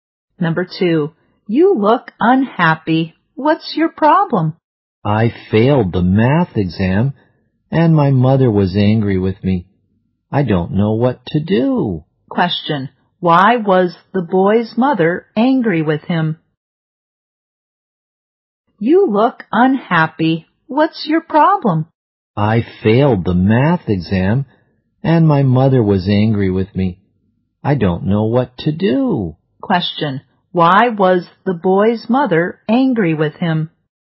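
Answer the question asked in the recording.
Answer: He failed the math exam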